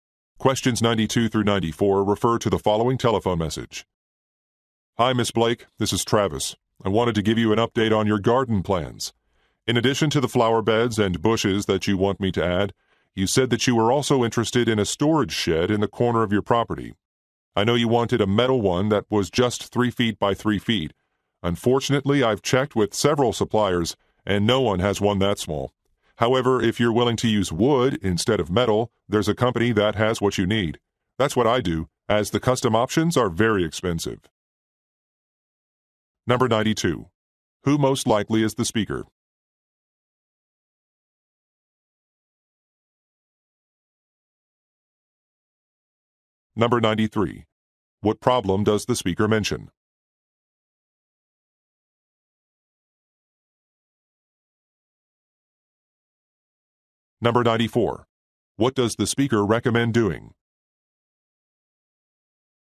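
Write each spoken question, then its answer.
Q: Who most likely is the speaker?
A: A landscaper

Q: What problem does the speaker mention?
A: No supplier has a metal shed that small

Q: What does the speaker recommend doing?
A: Using a wood shed instead of metal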